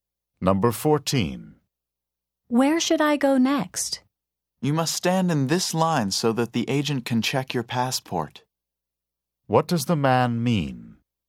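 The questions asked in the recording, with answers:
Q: What does the man mean?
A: The speaker should wait in line for a passport check.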